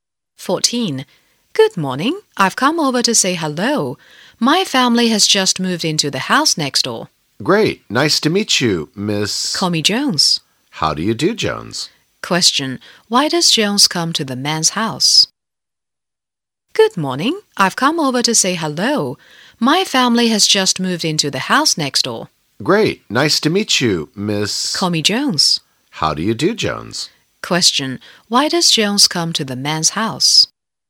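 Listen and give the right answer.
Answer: To say hello to her new neighbor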